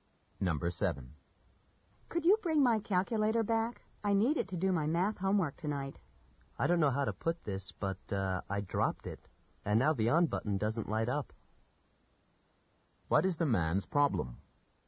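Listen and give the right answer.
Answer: He broke the woman's calculator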